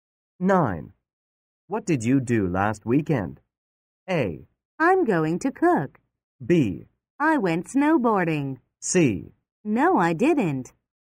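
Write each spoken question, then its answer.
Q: What did you do last weekend?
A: B: I went snowboarding.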